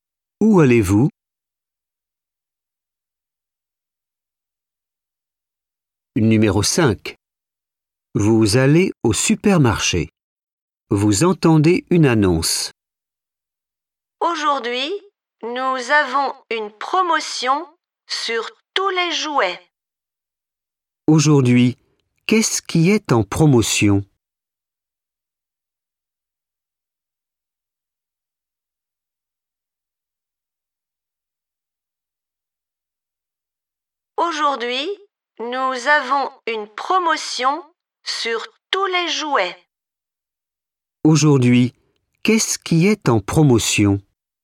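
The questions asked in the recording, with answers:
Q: Aujourd'hui, qu'est-ce qui est en promotion?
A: les jouets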